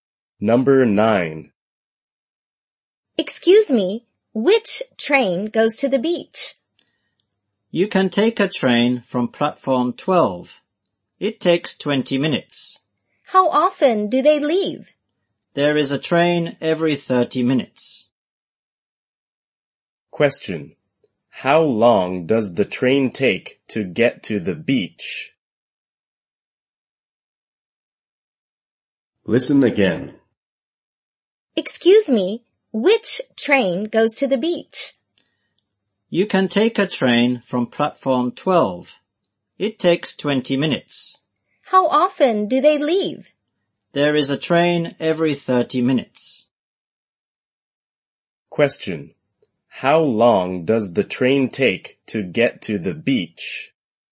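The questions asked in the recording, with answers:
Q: How long does the train take to get to the beach?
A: 20 minutes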